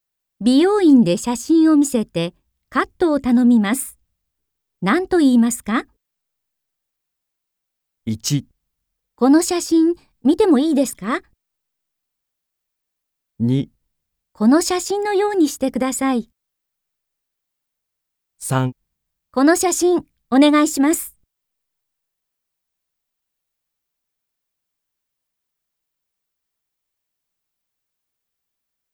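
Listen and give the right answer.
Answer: 2: この写真のようにしてください。

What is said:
F: 1 この写真、見てもいいですか。
2 この写真のようにしてください。
3 この写真、お願いします。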